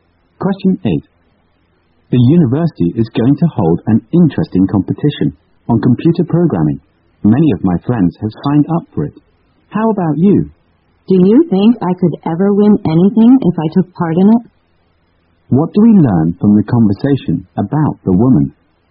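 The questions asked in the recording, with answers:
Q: What do we learn from the conversation about the woman?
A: She has no confidence in winning the competition.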